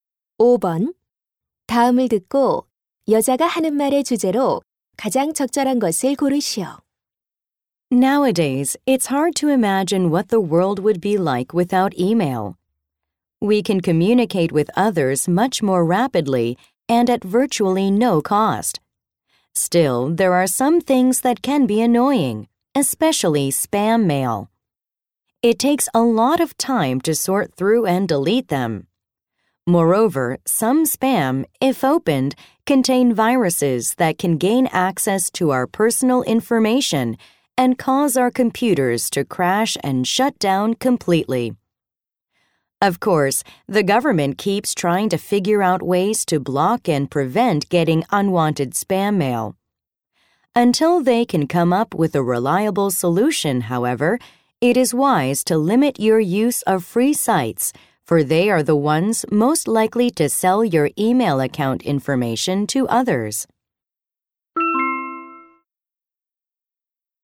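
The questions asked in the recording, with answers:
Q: 다음을 듣고 여자가 하는 말의 주제로 가장 적절한 것을 고르시오.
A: 스팸 메일을 피하기 위해 무료 사이트 이용을 제한해야 한다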